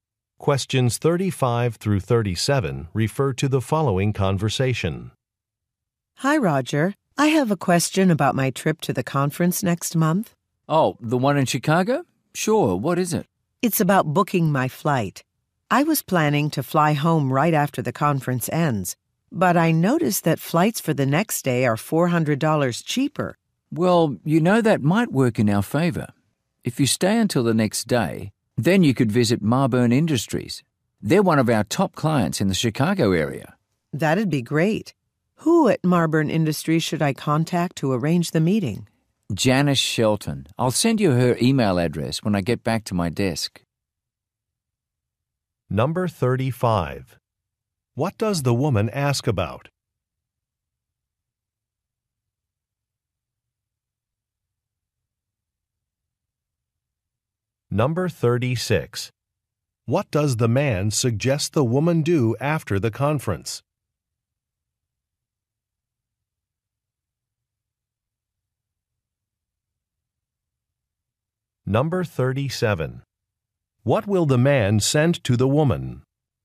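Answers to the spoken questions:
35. Booking her flight
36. Visit a client, Marburn Industries
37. Janice Shelton's email address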